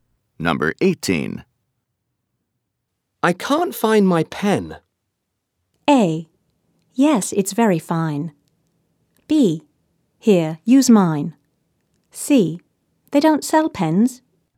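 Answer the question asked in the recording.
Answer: B: Here, use mine.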